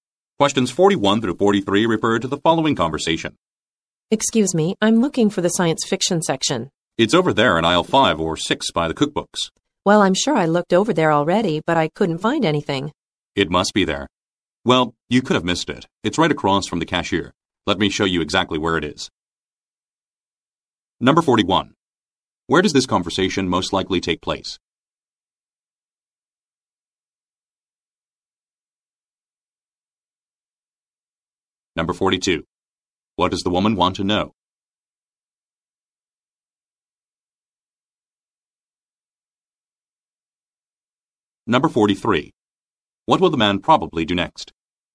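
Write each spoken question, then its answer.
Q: Where does this conversation most likely take place?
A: In a bookstore

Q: What does the woman want to know?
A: Where the science fiction section is

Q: What will the man probably do next?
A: Show her where the section is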